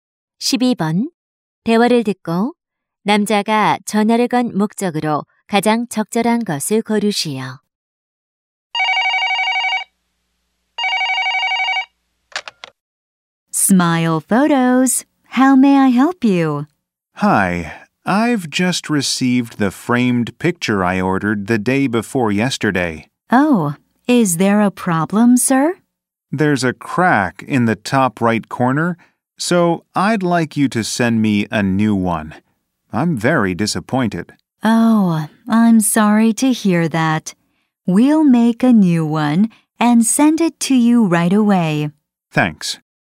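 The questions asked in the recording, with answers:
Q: 대화를 듣고 남자가 전화를 건 목적으로 가장 적절한 것을 고르시오.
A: 금이 간 액자를 새로 보내 달라고 요청하려고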